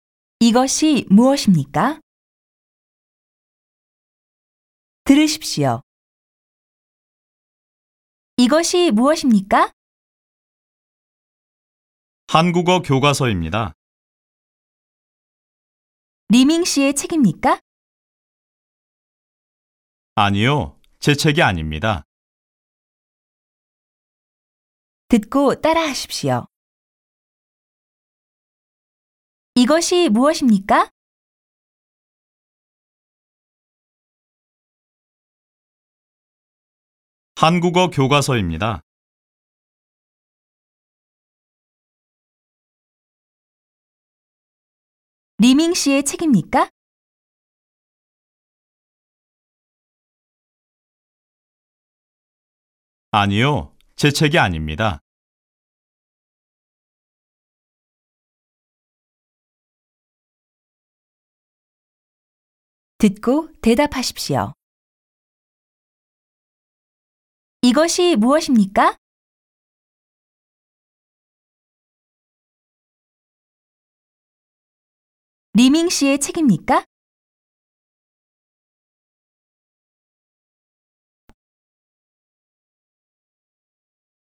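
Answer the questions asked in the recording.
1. 한국어 교과서입니다.
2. 아니요, 리밍 씨의 책이 아닙니다.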